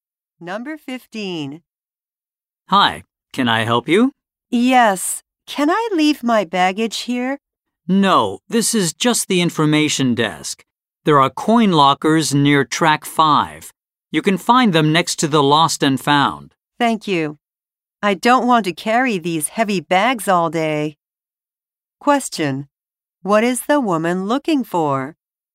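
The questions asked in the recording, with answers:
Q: What is the woman looking for?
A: A place to leave her baggage (coin lockers)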